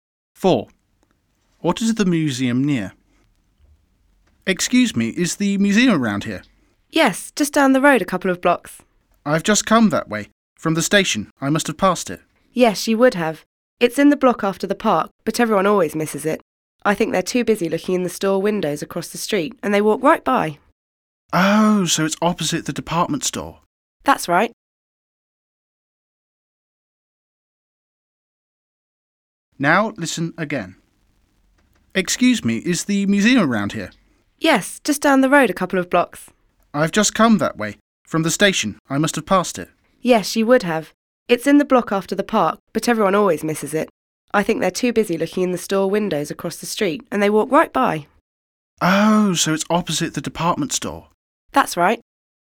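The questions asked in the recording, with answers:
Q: What is the museum near?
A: opposite the department store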